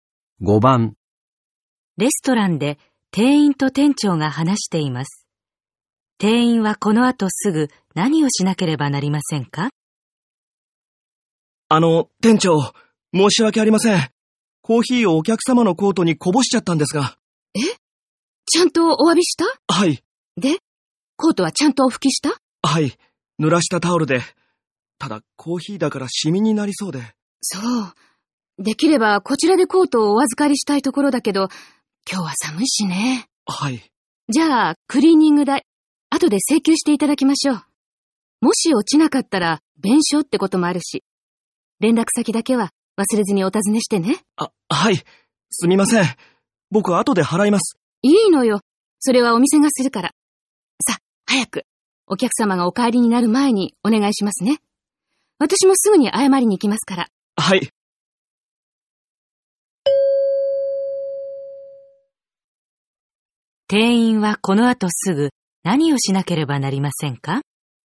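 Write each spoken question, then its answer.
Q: 店員はこの後すぐ何をしなければなりませんか?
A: お客様の連絡先を尋ねる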